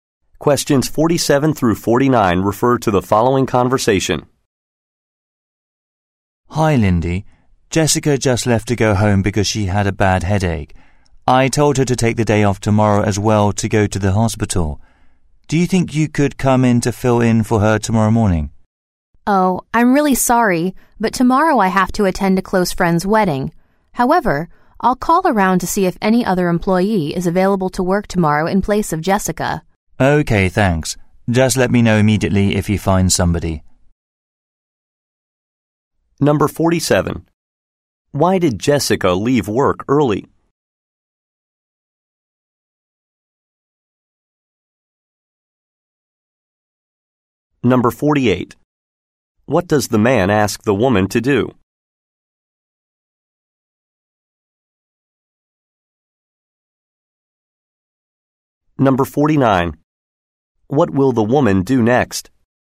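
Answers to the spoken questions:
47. She had a bad headache
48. Fill in for Jessica tomorrow morning
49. Call other employees to find a replacement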